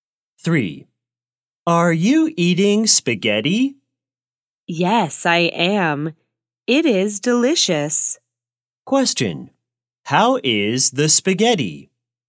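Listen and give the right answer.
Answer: It is delicious.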